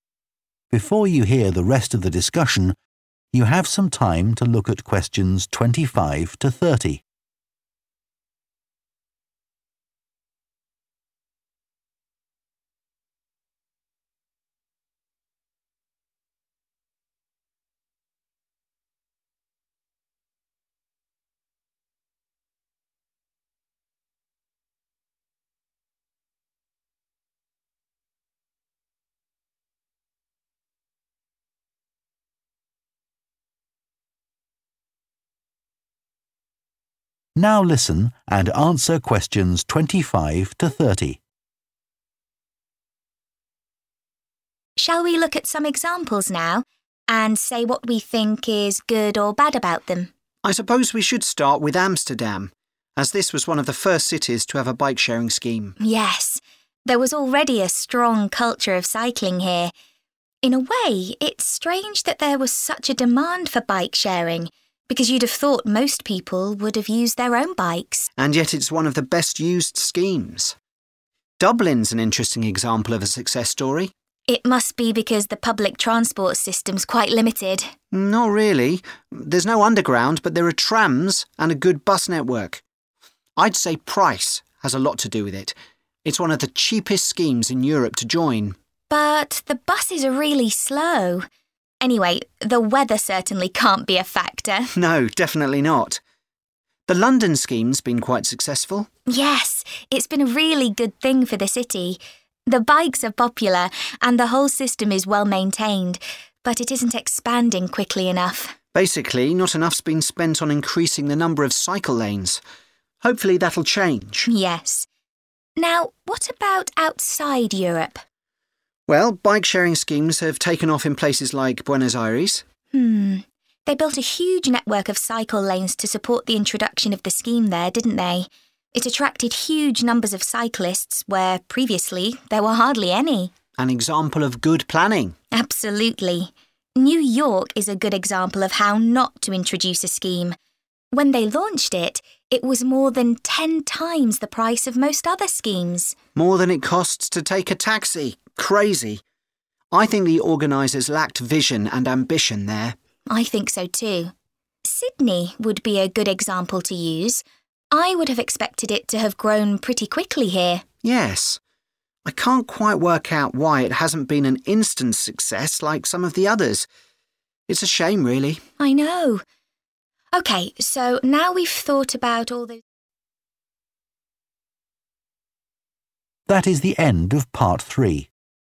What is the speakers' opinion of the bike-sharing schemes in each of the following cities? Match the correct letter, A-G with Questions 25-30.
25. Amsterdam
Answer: (C) They are surprised it has been so successful.

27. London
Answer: (D) They agree that more investment is required.

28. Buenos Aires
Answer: (E) They think the system has been well designed.

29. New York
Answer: (B) They think it should be cheaper.